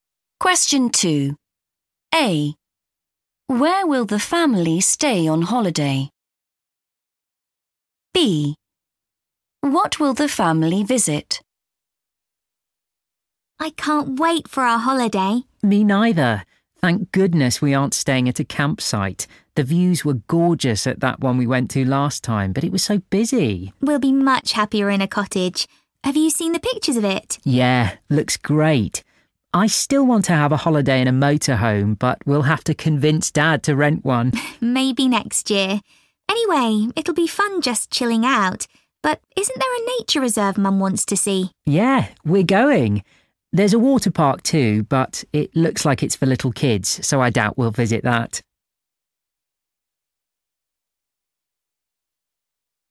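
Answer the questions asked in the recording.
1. in a cottage
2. a nature reserve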